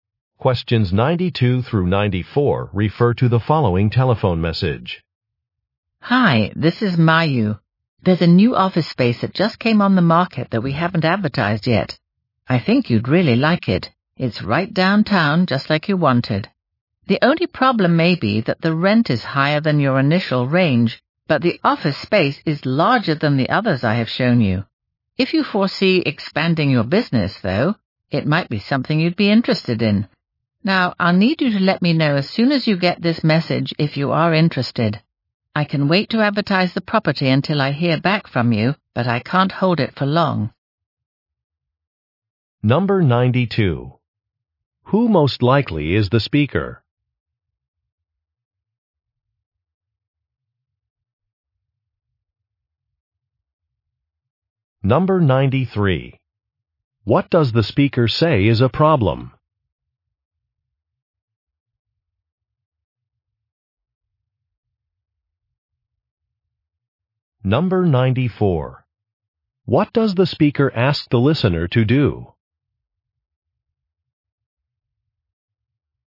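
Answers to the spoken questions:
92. A real estate agent
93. The rent is higher than the listener's initial range
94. Let her know quickly whether they are interested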